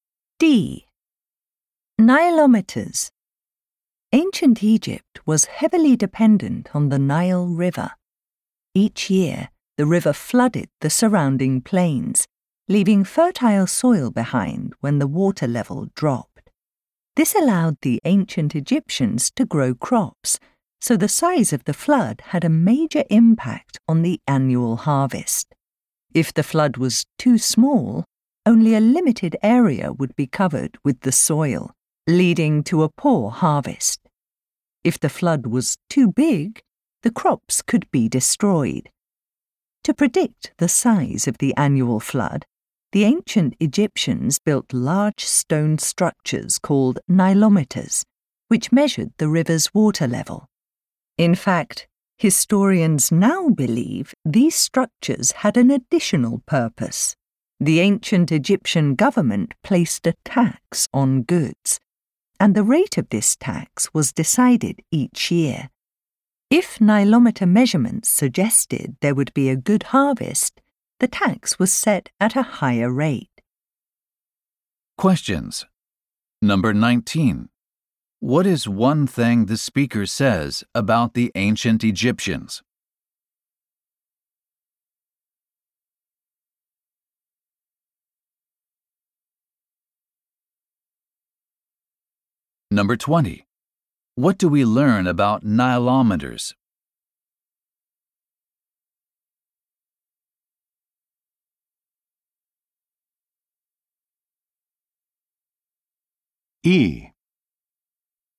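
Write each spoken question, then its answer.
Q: What do we learn about nilometers?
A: They were also used to set the annual tax rate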